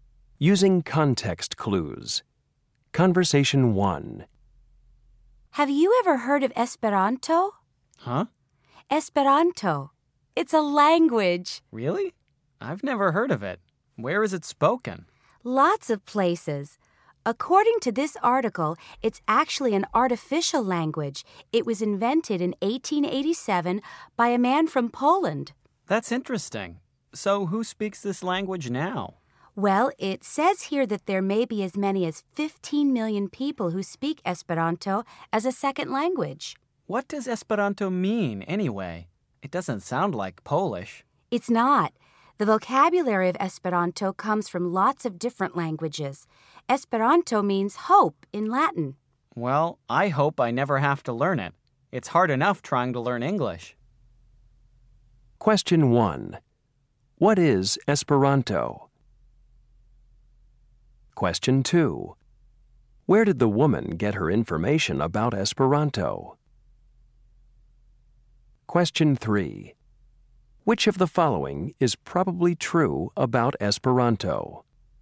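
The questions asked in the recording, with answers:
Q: What is Esperanto?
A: An artificial language

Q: Where did the woman get her information about Esperanto?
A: From an article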